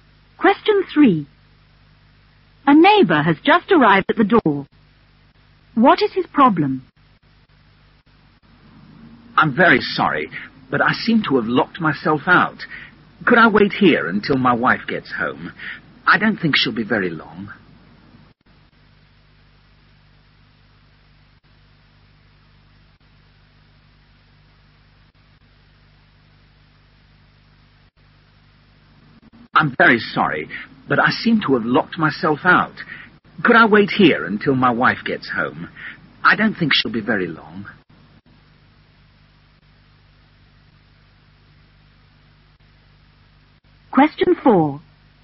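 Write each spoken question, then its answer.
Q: What is his problem?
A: He has locked himself out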